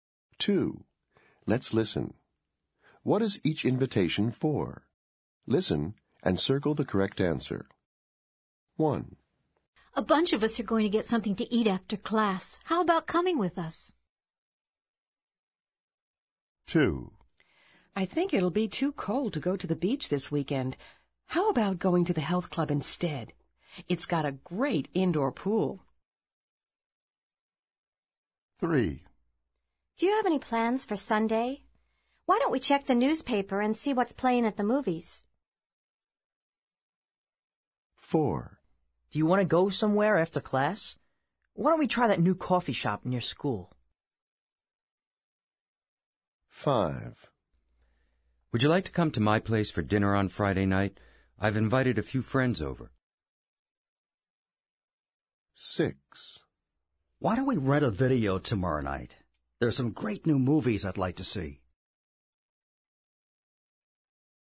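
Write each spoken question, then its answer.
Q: What is each invitation for?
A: to get something to eat after class

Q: What is each invitation for?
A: to go to the health club (indoor pool)

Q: What is each invitation for?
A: to go to the movies on Sunday

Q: What is each invitation for?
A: to go to a new coffee shop

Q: What is each invitation for?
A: dinner on Friday night

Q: What is each invitation for?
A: to rent a video tomorrow night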